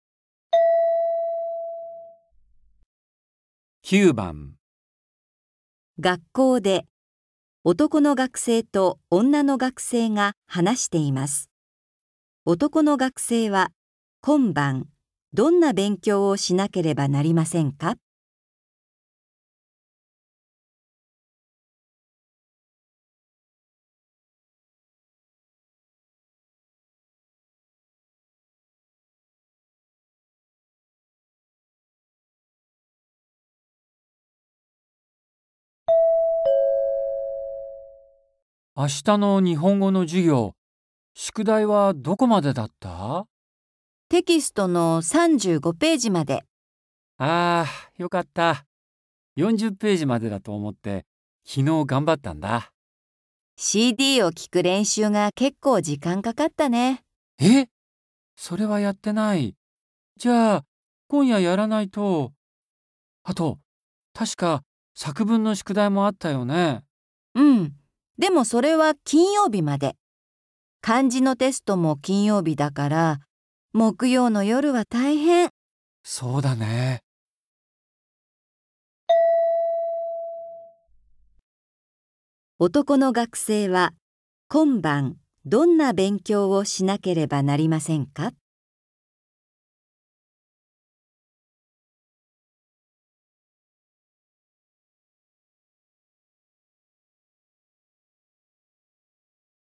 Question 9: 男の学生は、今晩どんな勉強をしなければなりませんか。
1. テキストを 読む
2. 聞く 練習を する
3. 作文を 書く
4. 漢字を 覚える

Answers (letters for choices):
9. 2

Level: N4